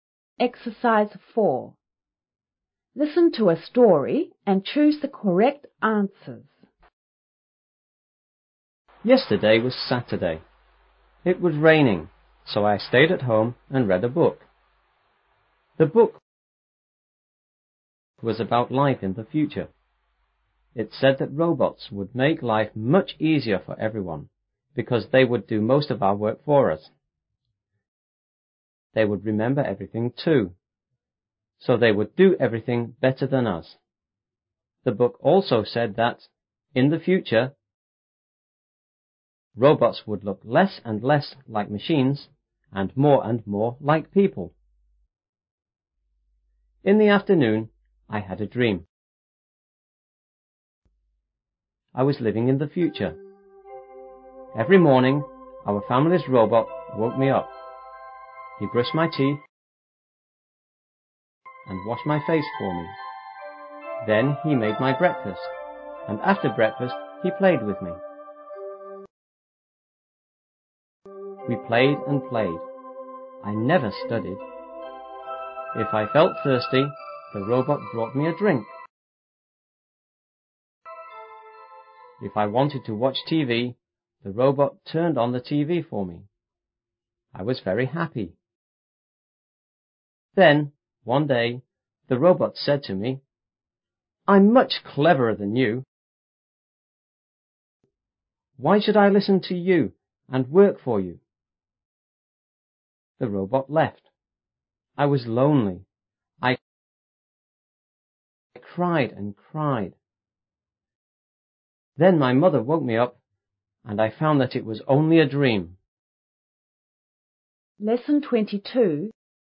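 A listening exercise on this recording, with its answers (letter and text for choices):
4.Listen to a story and choose the correct answer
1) What did I do yesterday?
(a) I watched TV.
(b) I read a book.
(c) I had a sleep.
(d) Both b) and c).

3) In my dream,who woke me up every morning?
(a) My mother.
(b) My family.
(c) Our robot.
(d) Me.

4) In my dream,what did I never do?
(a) I never read.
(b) I never studied.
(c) I never drank.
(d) I never went out.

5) Why did the robot leave me?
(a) It thought I was less clever.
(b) I was a good student.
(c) My mother didn't like it.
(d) It didn't like working.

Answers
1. (d) Both b) and c).
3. (c) Our robot.
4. (b) I never studied.
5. (a) It thought I was less clever.

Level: 5B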